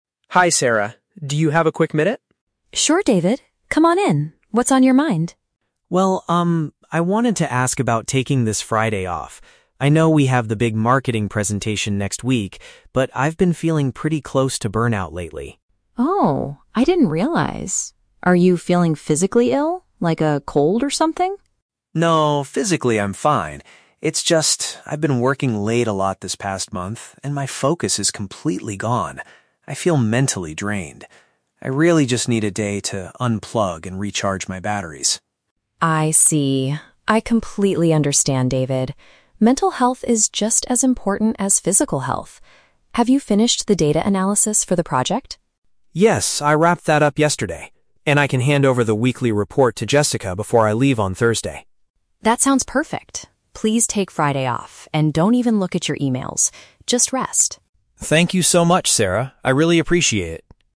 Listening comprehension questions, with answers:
Listen to a conversation between an employee and his manager. Choose the correct answer (A, B, or C) for each question.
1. Why does David want to take Friday off?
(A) He is experiencing severe mental exhaustion.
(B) He wants more time to prepare for a presentation.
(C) He has caught a bad cold and needs to see a doctor.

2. What work task did David recently complete?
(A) The upcoming marketing presentation.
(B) The examination of project information.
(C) A training session for his coworker.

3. What does Sarah advise David to do on his day off?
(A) Avoid checking any work-related messages.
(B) Spend some time doing physical exercise.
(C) Send his weekly report to the team on Friday.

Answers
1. (A) He is experiencing severe mental exhaustion.
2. (B) The examination of project information.
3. (A) Avoid checking any work-related messages.

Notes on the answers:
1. The Key: David says his "focus is completely gone" and he feels "mentally drained" and "close to burnout". This is paraphrased as "experiencing severe mental exhaustion". The Trap (C): Sarah asks if he has "a cold or something", but David explicitly says "physically I'm fine" (Mentioned but rejected). The Trap (B): The "marketing presentation" is mentioned, but it is happening next week and is actually a reason why he shouldn't take time off, not his reason for resting.
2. The Key: Sarah asks if he finished the "data analysis for the project", and David says "I wrapped that up yesterday". "Data analysis" is paraphrased as "examination of project information". The Trap (A): The marketing presentation is mentioned, but it is not finished; it is happening next week (Mentioned but wrong context). Plausible Trap (C): Training a coworker is a plausible office task, and a coworker (Jessica) is mentioned, but he is only giving her a report, not training her.
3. The Key: Sarah tells David "don't even look at your emails", which is paraphrased as "Avoid checking any work-related messages". The Trap (C): The weekly report is mentioned, but David says he will hand it over to Jessica on Thursday, before he leaves for his day off. Plausible Trap (B): Doing physical exercise is good for health, but Sarah never mentions it in the conversation.

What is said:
David: Hi Sarah, do you have a quick minute?
Sarah: Sure, David. Come on in. What's on your mind?
David: Well, um, I wanted to ask about taking this Friday off. I know we have the big marketing presentation next week, but I've been feeling pretty close to burnout lately.
Sarah: Oh, I didn't realize. Are you feeling physically ill? Like a cold or something?
David: No, physically I'm fine. It's just... I've been working late a lot this past month, and my focus is completely gone. I feel mentally drained. I really just need a day to unplug and recharge my batteries.
Sarah: I see. I completely understand, David. Mental health is just as important as physical health. Have you finished the data analysis for the project?
David: Yes, I wrapped that up yesterday. And I can hand over the weekly report to Jessica before I leave on Thursday.
Sarah: That sounds perfect. Please take Friday off and don't even look at your emails. Just rest.

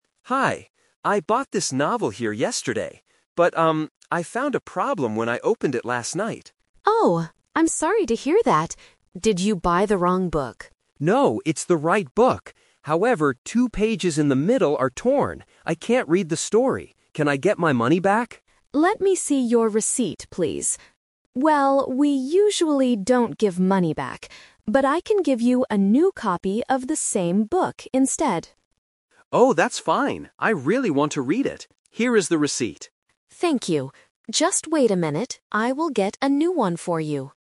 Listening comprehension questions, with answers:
Listen to a conversation between a customer and a bookstore clerk. Choose the correct answer A, B, or C.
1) Why did the man come back to the bookstore?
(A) He bought the wrong book.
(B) He wanted to buy another novel.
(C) His book had torn pages.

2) What did the man originally ask the clerk to do?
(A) Give his money back.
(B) Give him a new copy.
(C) Give him a new receipt.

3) What will the clerk do for the man in the end?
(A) Give his money back.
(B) Give him a new copy of the book.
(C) Read the story to him.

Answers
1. (C) His book had torn pages.
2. (A) Give his money back.
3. (B) Give him a new copy of the book.

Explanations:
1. The customer says, "However, two pages in the middle are torn." Trap: Option A is a trap. The clerk asks "Did you buy the wrong book?" but the customer answers "No". Option B is a trap because he came to solve a problem with the book he bought yesterday, not to buy another one.
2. The customer explicitly asks, "Can I get my money back?" Trap: Option B (give him a new copy) is the final solution offered by the clerk, not what the man asked for at first. Option C uses the word "receipt" from the audio, but he already has the receipt.
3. The clerk says, "But I can give you a new copy of the same book instead," and the man agrees. Trap: Option A is a strong trap. It is what the man wanted, but the clerk says "we usually don't give money back." Option C is a nonsense distractor using the words "read" and "story" from the man's dialogue.

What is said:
Customer: Hi. I bought this novel here yesterday. But, um, I found a problem when I opened it last night.
Clerk: Oh, I'm sorry to hear that. Did you buy the wrong book?
Customer: No, it's the right book. However, two pages in the middle are torn. I can't read the story. Can I get my money back?
Clerk: Let me see your receipt, please. Well, we usually don't give money back. But I can give you a new copy of the same book instead.
Customer: Oh, that's fine. I really want to read it. Here is the receipt.

